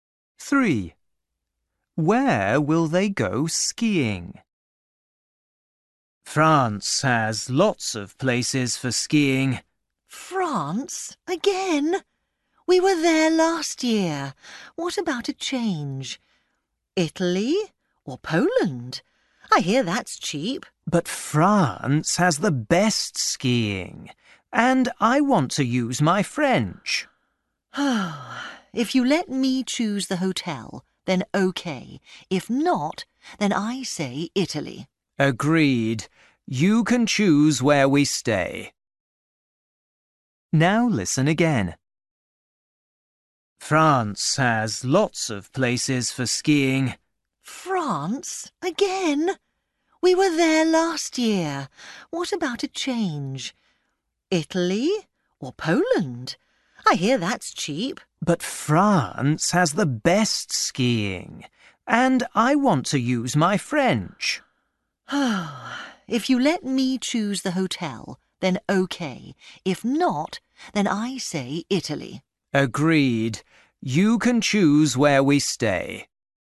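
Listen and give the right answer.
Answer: France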